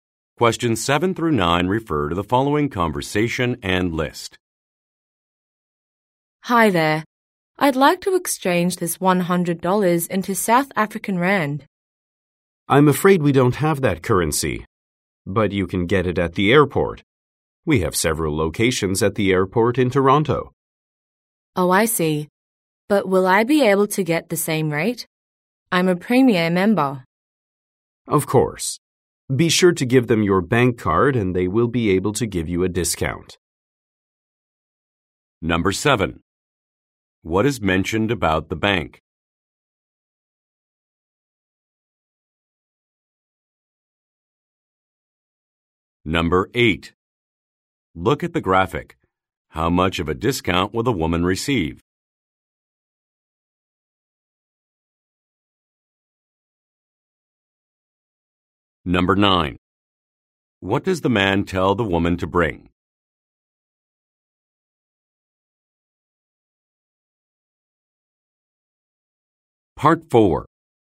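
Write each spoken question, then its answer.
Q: What does the man tell the woman to bring?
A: Her bank card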